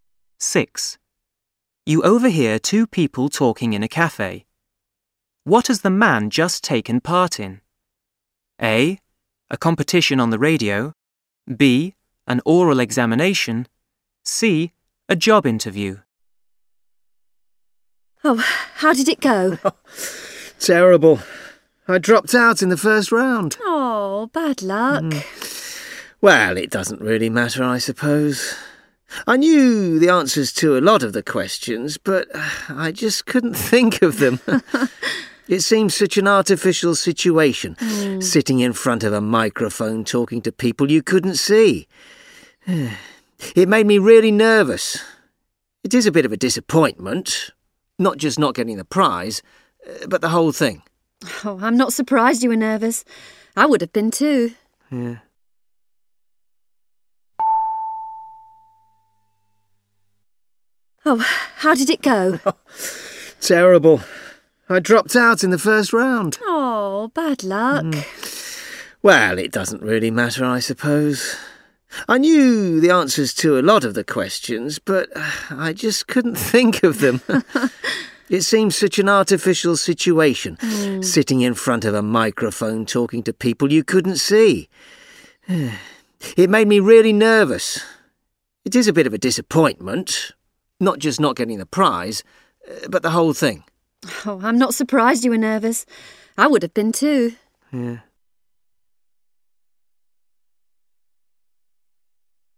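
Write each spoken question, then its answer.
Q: What has the man just taken part in?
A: A: A competition on the radio.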